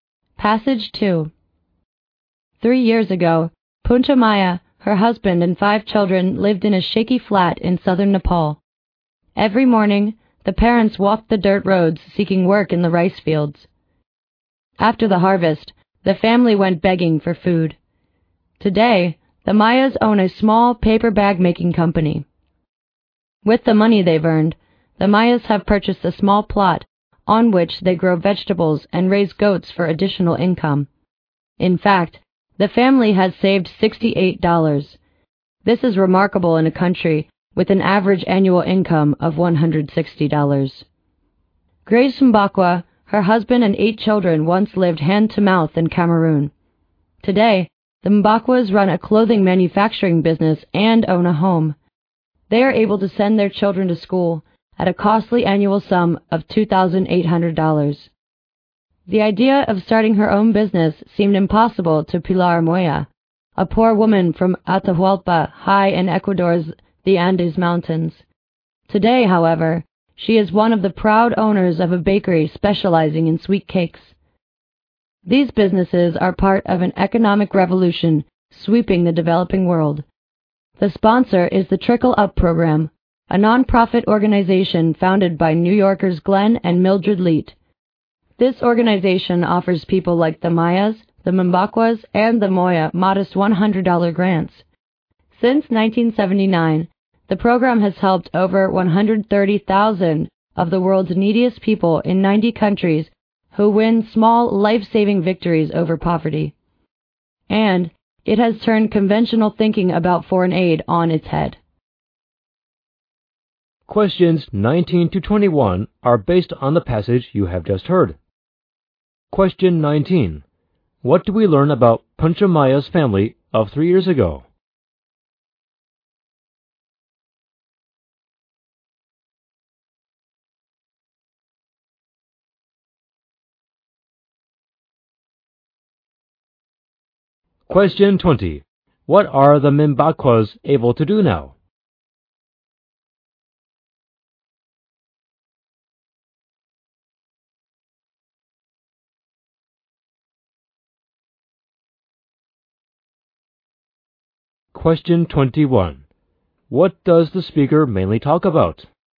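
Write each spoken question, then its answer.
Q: What do we learn about Panchamaya's family of 3 years ago?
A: They were very poor: they looked for work in the rice fields and begged for food after the harvest.

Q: What are the Mimbakwas able to do now?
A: Send their children to school.

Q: What does the speaker mainly talk about?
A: The Trickle Up Program, which helps poor people start small businesses.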